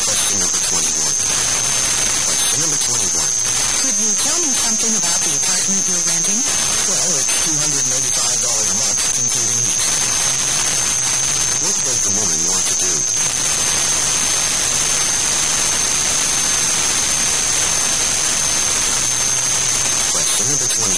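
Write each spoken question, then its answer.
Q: What does the woman want to do?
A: Find out about the man's apartment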